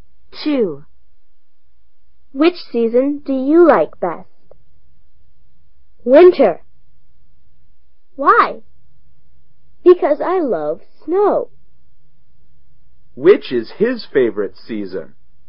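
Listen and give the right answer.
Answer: Winter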